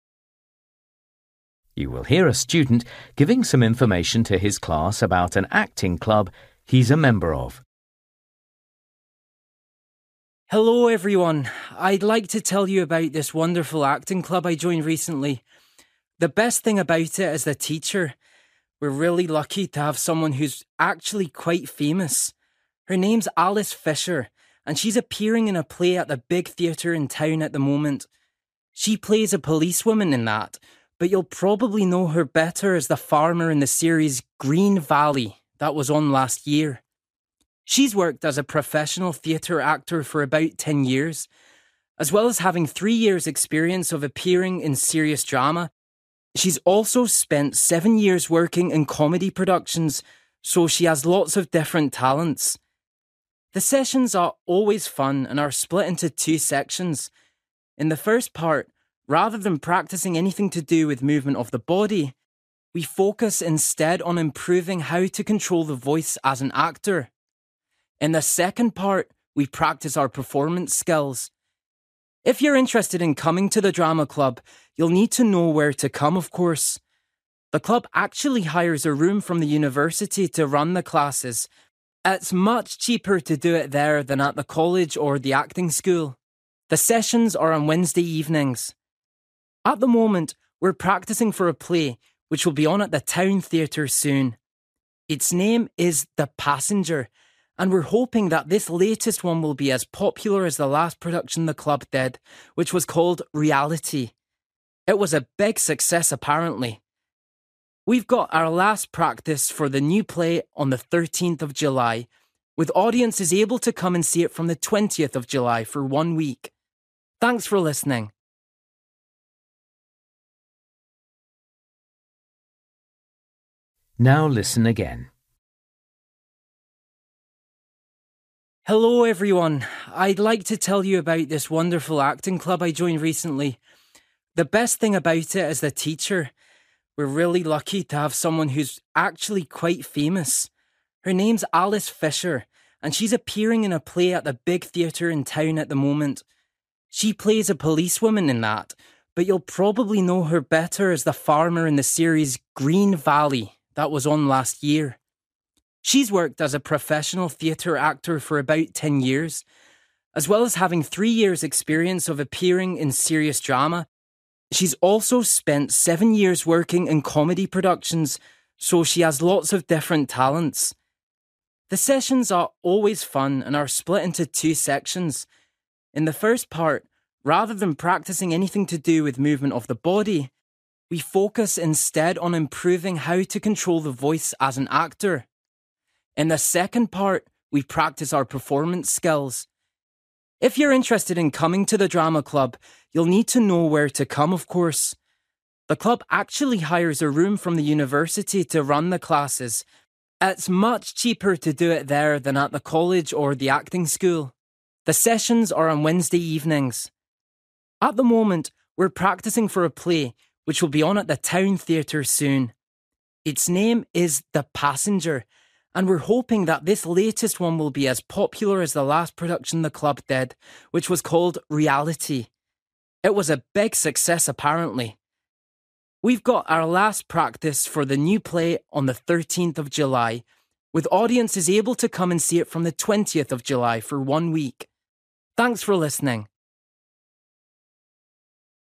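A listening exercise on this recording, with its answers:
For each question, write the correct answer in the gap. Write one or two words or a number or a date or a time. You will hear a student giving some information to his class about an acting club he's a member of.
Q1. Appeared on TV as a (1)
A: farmer

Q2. Has mostly appeared in (2) shows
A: comedy

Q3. First part - using your (3) well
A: voice

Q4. Take place at the (4)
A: university

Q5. Called (5)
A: The Passenger

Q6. First performance - on (6)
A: 20th July

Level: Luyện nghe trình độ B1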